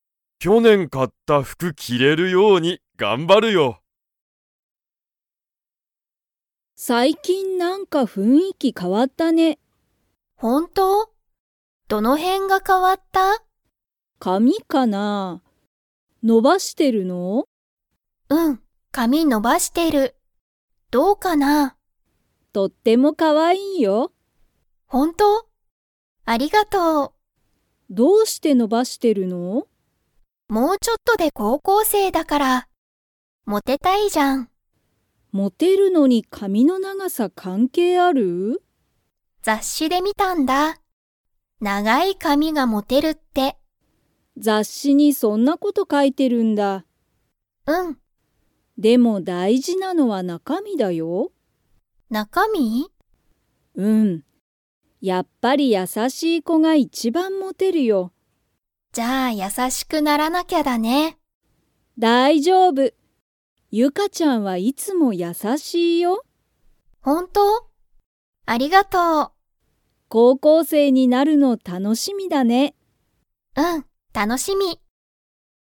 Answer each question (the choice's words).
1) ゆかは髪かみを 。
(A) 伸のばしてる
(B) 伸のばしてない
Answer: 伸のばしてる

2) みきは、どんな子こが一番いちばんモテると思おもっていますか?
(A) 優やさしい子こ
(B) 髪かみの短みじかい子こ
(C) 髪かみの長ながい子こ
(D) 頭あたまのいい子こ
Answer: 優やさしい子こ

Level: Level 4